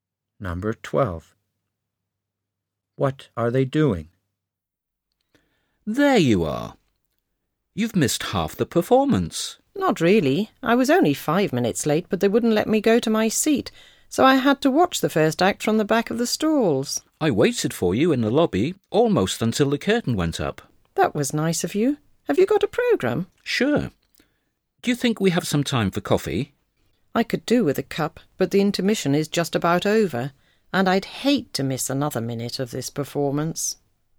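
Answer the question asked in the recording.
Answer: Meeting at the theatre during the interval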